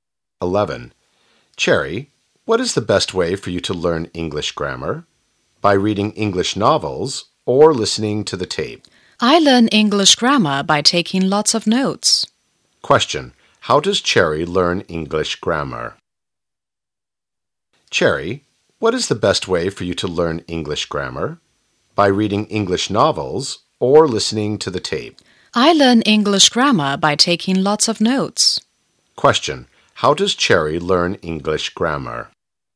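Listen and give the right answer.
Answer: By taking lots of notes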